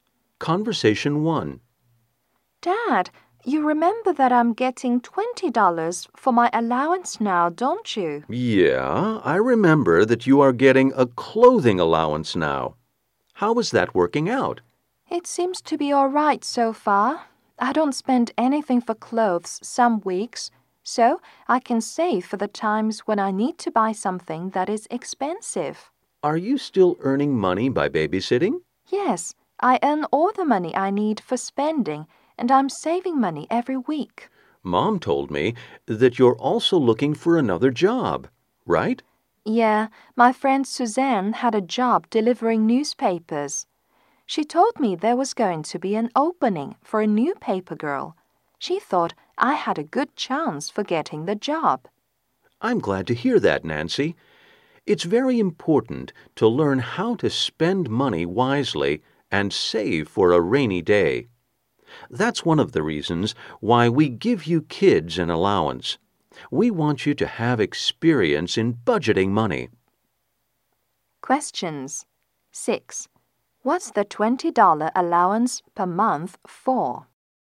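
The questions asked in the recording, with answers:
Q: What's the $20 allowance per month for?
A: Clothes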